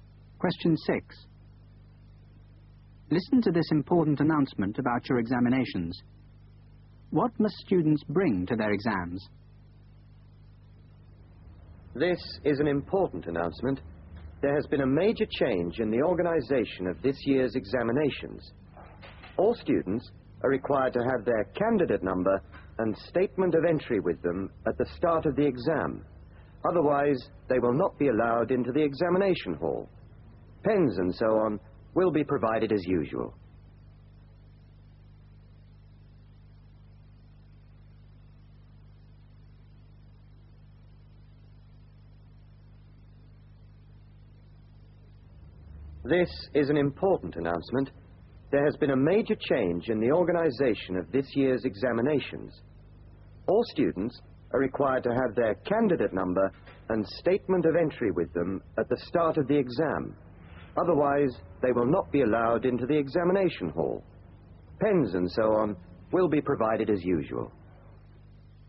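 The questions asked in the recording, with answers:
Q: What must students bring to their exams?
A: Their candidate number and statement of entry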